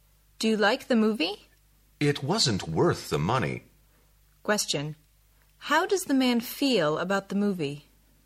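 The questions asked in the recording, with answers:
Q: How does the man feel about the movie?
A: It wasn't worth the money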